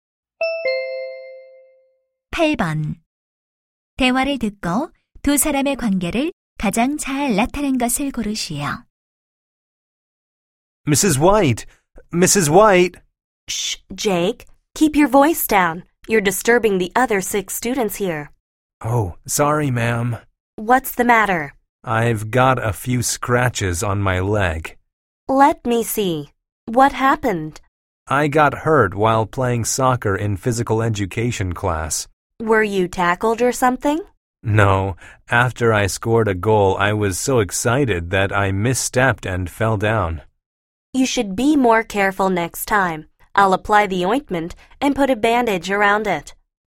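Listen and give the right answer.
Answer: 보건 교사 - 학생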